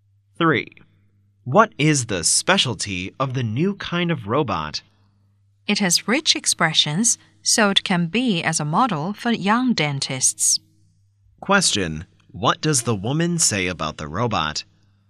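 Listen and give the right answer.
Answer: It has rich expressions, so it can be a model for young dentists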